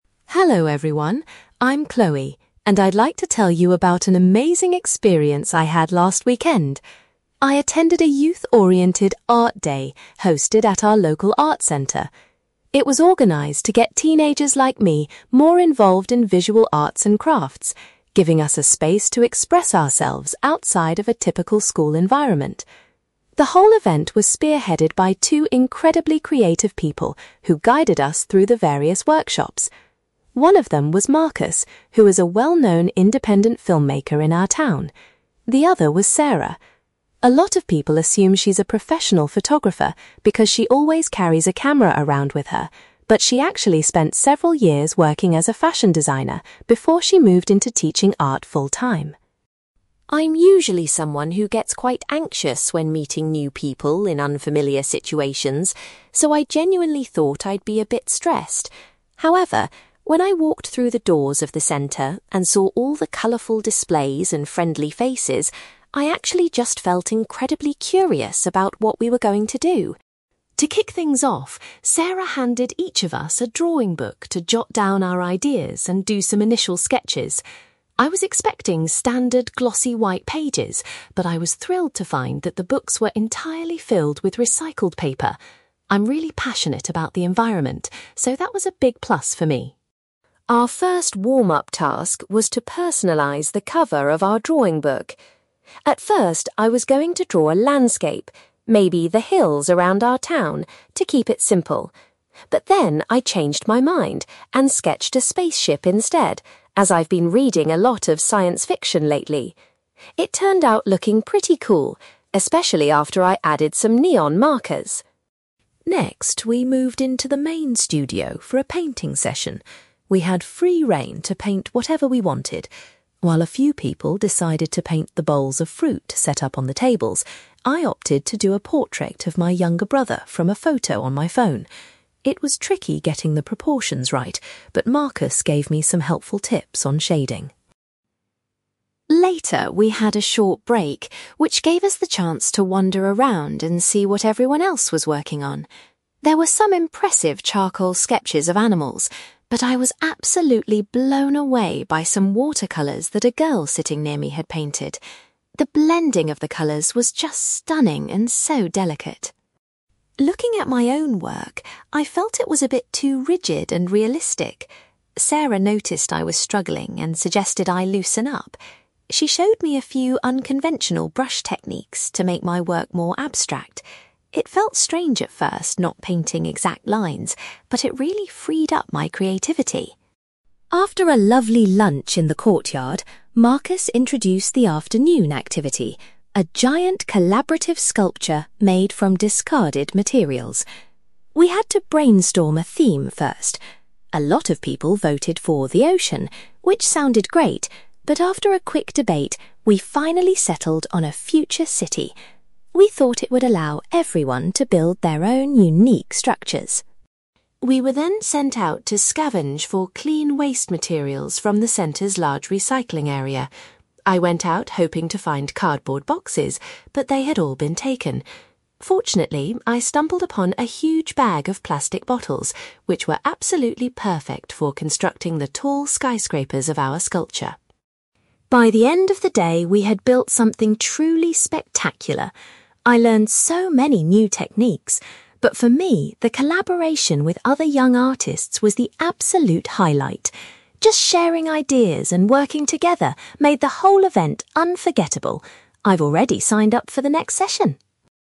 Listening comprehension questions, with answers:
You will hear a girl called Chloe giving a presentation about an Art Day she attended at a local arts centre. For questions 9-18, complete the sentences with a word or short phrase.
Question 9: Chloe mentions one of the organisers previously worked as a (9)........................... before teaching art.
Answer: fashion designer

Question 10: When she first arrived at the arts centre, Chloe felt (10)........................... about the upcoming activities.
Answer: curious

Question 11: Chloe was pleased to discover that her new sketchbook contained (11)........................... .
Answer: recycled paper

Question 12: Because of her interest in science fiction, Chloe drew a (12)........................... on her sketchbook cover.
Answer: spaceship

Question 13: For her main painting, Chloe chose to do a (13)........................... of a family member.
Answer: portrait

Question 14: During the break, Chloe was highly impressed by some (14)........................... produced by another student.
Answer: watercolours

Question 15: A teacher helped Chloe change her painting style to make it more (15)........................... .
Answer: abstract

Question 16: The group ultimately decided to base their large sculpture on the theme of a (16)........................... .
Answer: future city

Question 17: Chloe managed to find several (17)........................... to use for the sculpture's tall towers.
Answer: plastic bottles

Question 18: Chloe identifies the (18)........................... between the participants as the best part of the day.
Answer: collaboration

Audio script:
Chloe: Hello everyone! I'm Chloe, and I'd like to tell you about an amazing experience I had last weekend. I attended a youth-oriented 'Art Day' hosted at our local arts centre. It was organised to get teenagers like me more involved in visual arts and crafts, giving us a space to express ourselves outside of a typical school environment. The whole event was spearheaded by two incredibly creative people who guided us through the various workshops. One of them was Marcus, who is a well-known independent filmmaker in our town. The other was Sarah. A lot of people assume she's a professional photographer because she always carries a camera around with her, but she actually spent several years working as a fashion designer before she moved into teaching art full-time.
I'm usually someone who gets quite anxious when meeting new people in unfamiliar situations, so I genuinely thought I'd be a bit stressed. However, when I walked through the doors of the centre and saw all the colourful displays and friendly faces, I actually just felt incredibly curious about what we were going to do.
To kick things off, Sarah handed each of us a drawing book to jot down our ideas and do some initial sketches. I was expecting standard glossy white pages, but I was thrilled to find that the books were entirely filled with recycled paper. I'm really passionate about the environment, so that was a big plus for me!
Our first warm-up task was to personalize the cover of our drawing book. At first, I was going to draw a landscape, maybe the hills around our town, to keep it simple. But then I changed my mind and sketched a spaceship instead, as I've been reading a lot of science fiction lately. It turned out looking pretty cool, especially after I added some neon markers!
Next, we moved into the main studio for a painting session. We had free rein to paint whatever we wanted. While a few people decided to paint the bowls of fruit set up on the tables, I opted to do a portrait of my younger brother from a photo on my phone. It was tricky getting the proportions right, but Marcus gave me some helpful tips on shading.
Later, we had a short break, which gave us the chance to wander around and see what everyone else was working on. There were some impressive charcoal sketches of animals, but I was absolutely blown away by some watercolours that a girl sitting near me had painted. The blending of the colours was just stunning and so delicate.
Looking at my own work, I felt it was a bit too rigid and realistic. Sarah noticed I was struggling and suggested I loosen up. She showed me a few unconventional brush techniques to make my work more abstract. It felt strange at first not painting exact lines, but it really freed up my creativity!
After a lovely lunch in the courtyard, Marcus introduced the afternoon activity: a giant collaborative sculpture made from discarded materials. We had to brainstorm a theme first. A lot of people voted for 'The Ocean', which sounded great, but after a quick debate, we finally settled on a future city. We thought it would allow everyone to build their own unique structures.
We were then sent out to scavenge for clean waste materials from the centre's large recycling area. I went out hoping to find cardboard boxes, but they had all been taken. Fortunately, I stumbled upon a huge bag of plastic bottles, which were absolutely perfect for constructing the tall skyscrapers of our sculpture.
By the end of the day, we had built something truly spectacular. I learned so many new techniques, but for me, the collaboration with other young artists was the absolute highlight. Just sharing ideas and working together made the whole event unforgettable. I've already signed up for the next session!

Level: B2